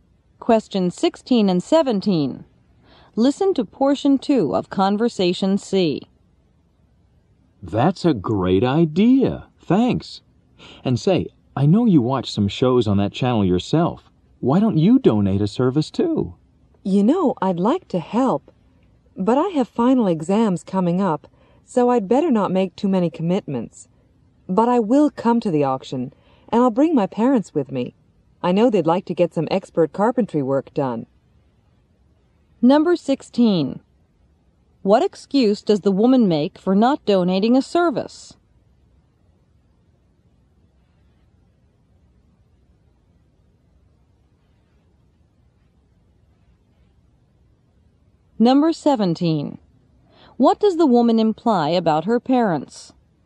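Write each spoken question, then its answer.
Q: What excuse does the woman make for not donating a service?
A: She has final exams coming up

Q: What does the woman imply about her parents?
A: They might bid on Roger's carpentry work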